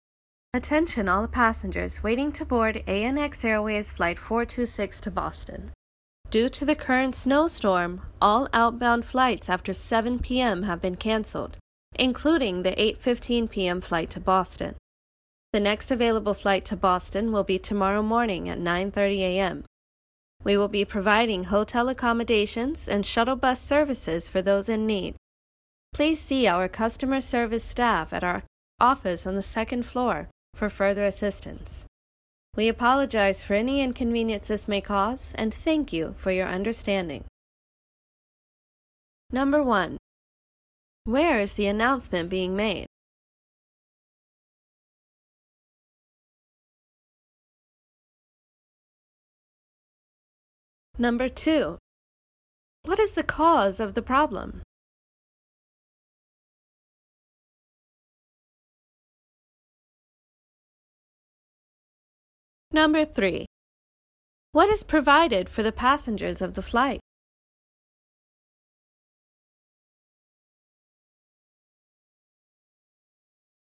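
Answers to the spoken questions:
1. At an airport
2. A snowstorm
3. Hotel accommodations and shuttle bus services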